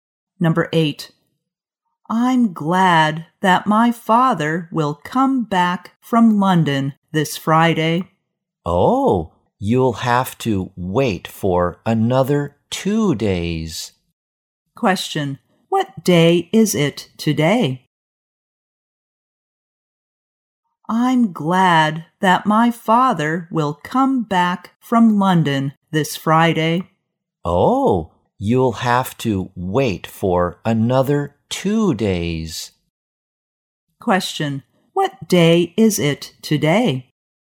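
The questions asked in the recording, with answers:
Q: what day is it today?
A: Wednesday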